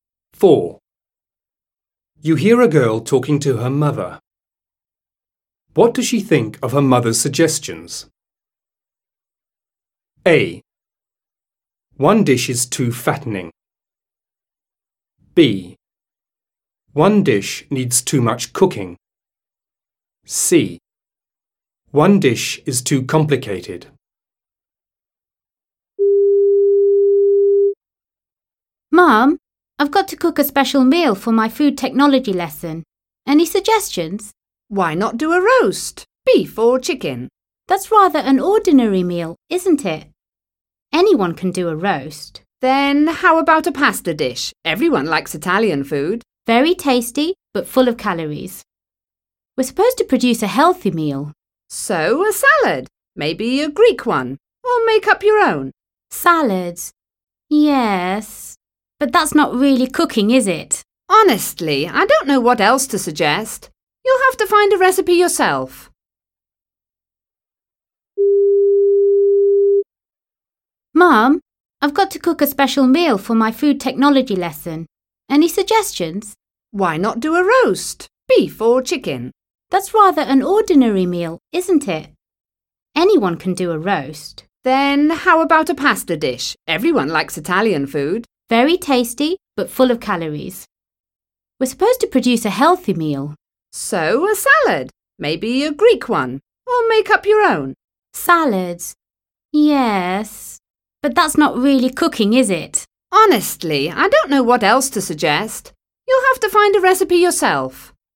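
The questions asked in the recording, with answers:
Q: What does she think of her mother's suggestions?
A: A: One dish is too fattening.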